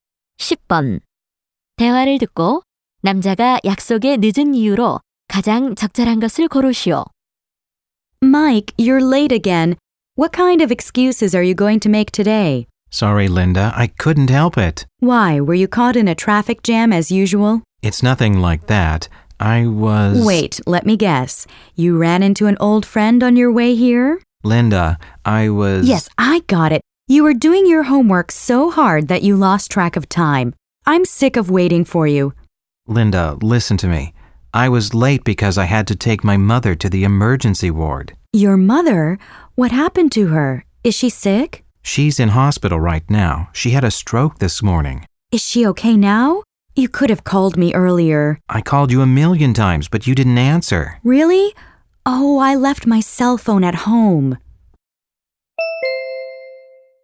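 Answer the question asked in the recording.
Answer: 어머니를 응급실에 모셔다 드려야 해서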